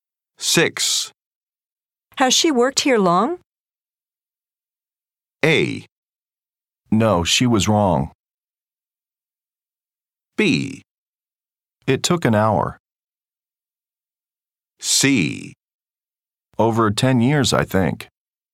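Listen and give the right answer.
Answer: C: Over 10 years, I think.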